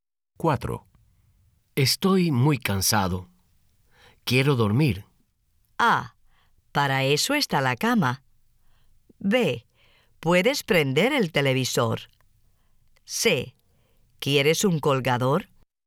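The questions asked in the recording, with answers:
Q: Estoy muy cansado. Quiero dormir.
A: A: Para eso está la cama.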